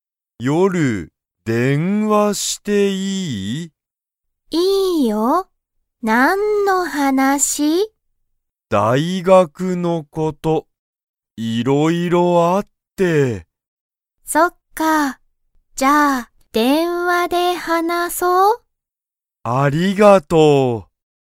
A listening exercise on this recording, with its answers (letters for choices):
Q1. ハヤトは、____のことを話(はな)したい。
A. 大学(だいがく)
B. 夜(よる)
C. 電話(でんわ)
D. 先生(せんせい)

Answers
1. A

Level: Level 1